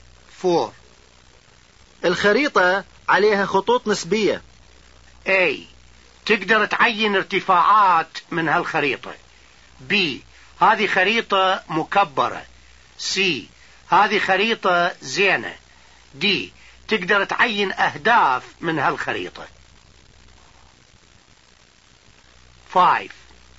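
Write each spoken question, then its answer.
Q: الخريطة عليها خطوط نسبية.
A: A: تقدر تعين ارتفاعات من هالخريطة.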